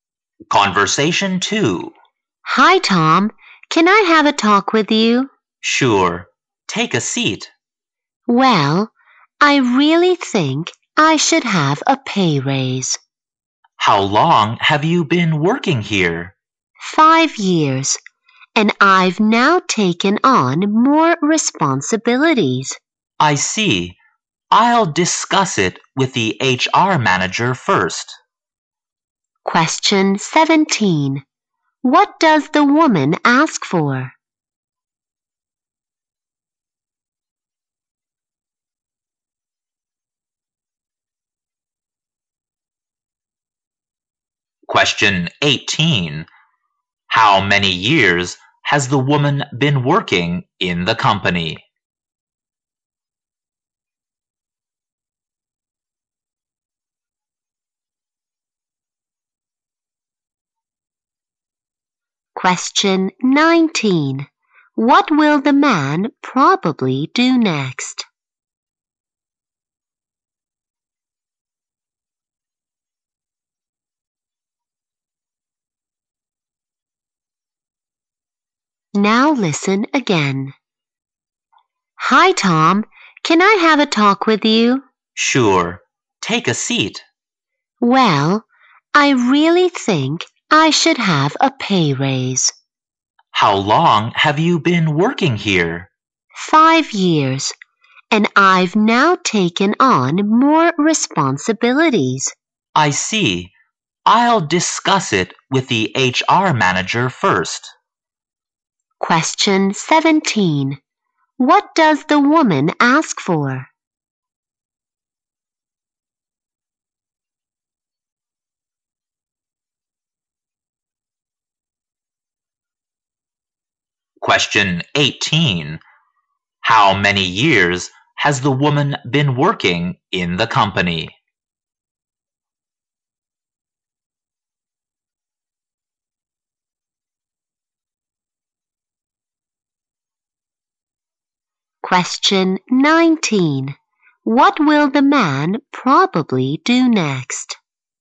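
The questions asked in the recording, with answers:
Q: What does the woman ask for?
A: A pay raise.

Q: How many years has the woman been working in the company?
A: 5 years.

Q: What will the man probably do next?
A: Discuss it with the HR manager.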